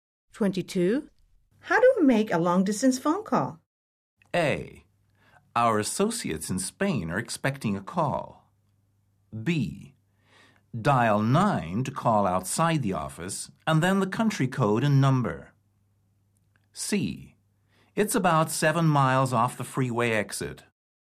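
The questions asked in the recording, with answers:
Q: How do we make a long-distance phone call?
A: B: Dial 9 to call outside the office, and then the country code and number.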